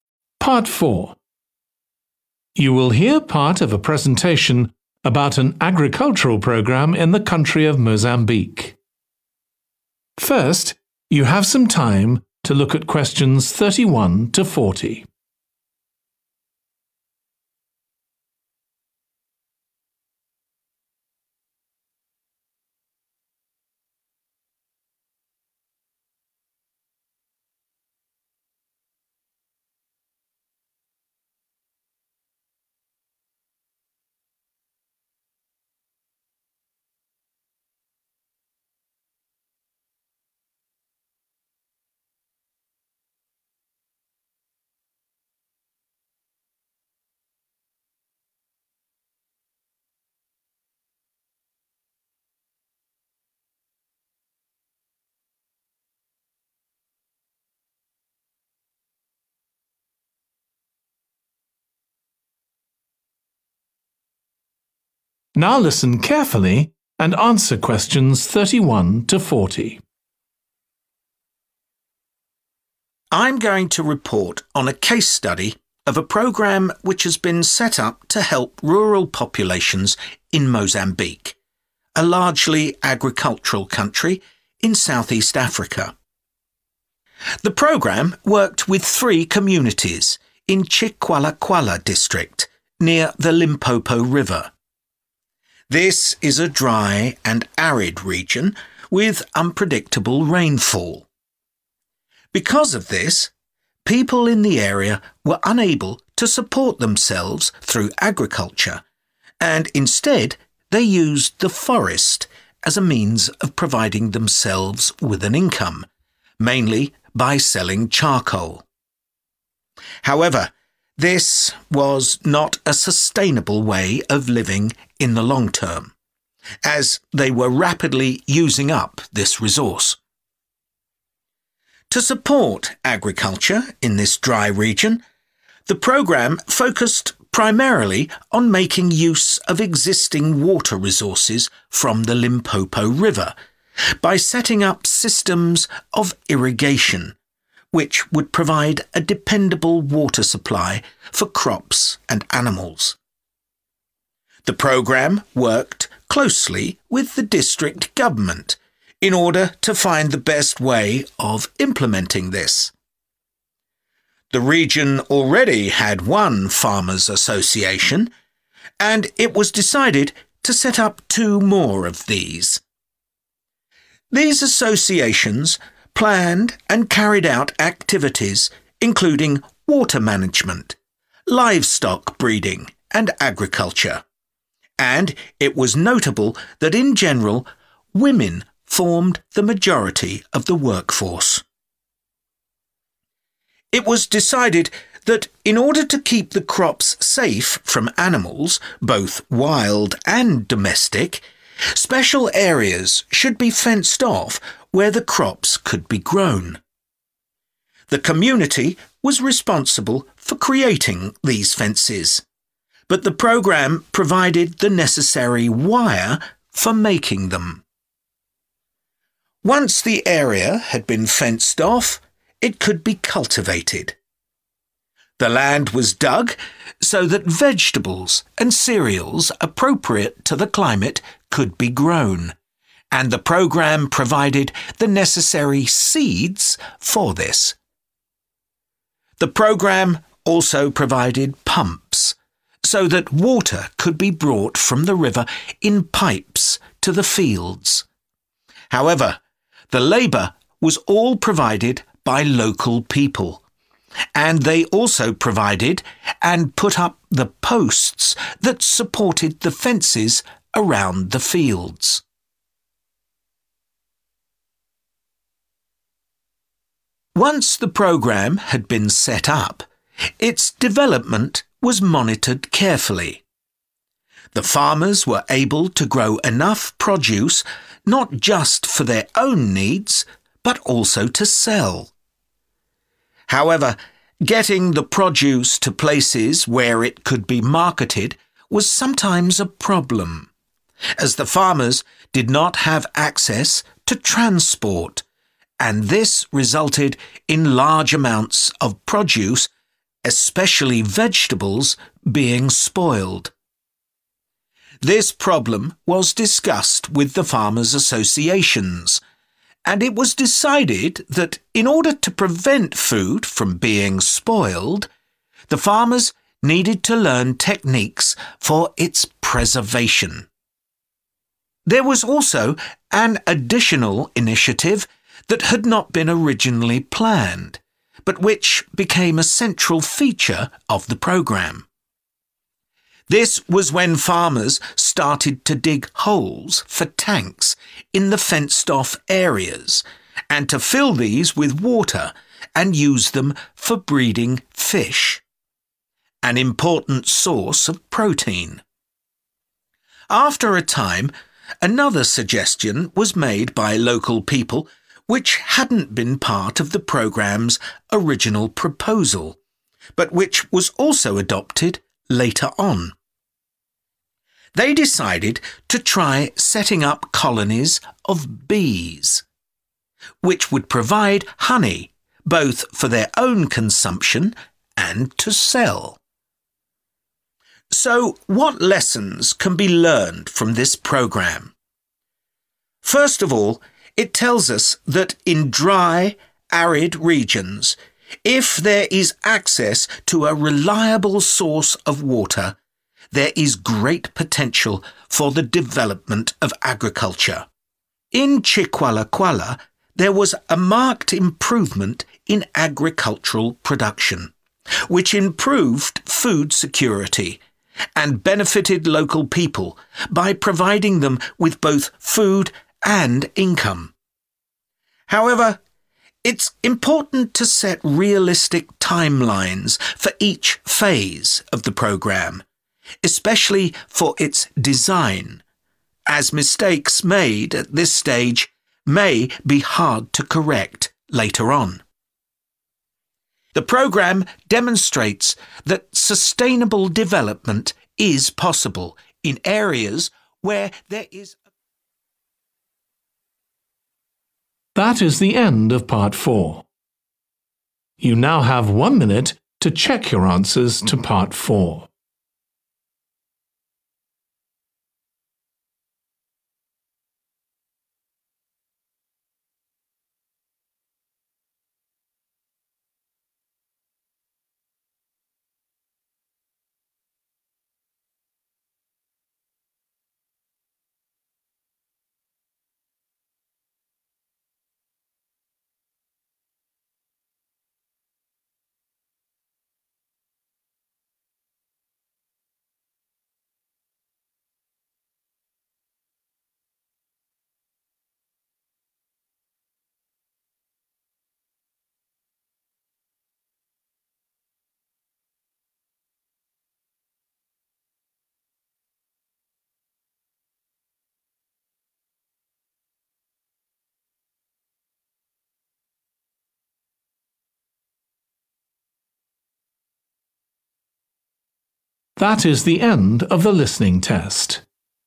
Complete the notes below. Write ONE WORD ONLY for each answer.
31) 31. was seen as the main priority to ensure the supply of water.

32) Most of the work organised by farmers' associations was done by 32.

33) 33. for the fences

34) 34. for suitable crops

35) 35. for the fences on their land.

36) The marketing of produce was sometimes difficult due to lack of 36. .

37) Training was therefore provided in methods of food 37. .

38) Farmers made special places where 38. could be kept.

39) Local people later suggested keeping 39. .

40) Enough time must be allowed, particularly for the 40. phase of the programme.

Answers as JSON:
{"31": "Irrigation", "32": "women", "33": "wire(s)", "34": "seed(s)", "35": "posts", "36": "transport", "37": "preservation", "38": "fish(es)", "39": "bees", "40": "design"}